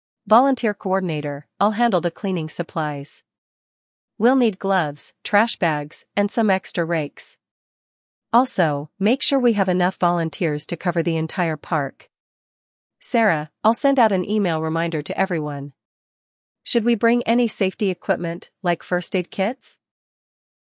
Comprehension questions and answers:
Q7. What cleaning supplies will be needed for the event?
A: Gloves, trash bags, and rakes.

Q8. What will Sarah do to help?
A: Sarah will send out an email reminder.

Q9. What additional equipment does Sarah suggest bringing?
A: A first-aid kit.

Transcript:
Volunteer Coordinator: I'll handle the cleaning supplies. We'll need gloves, trash bags, and some extra rakes. Also, make sure we have enough volunteers to cover the entire park.
Sarah: I'll send out an email reminder to everyone. Should we bring any safety equipment, like first-aid kits?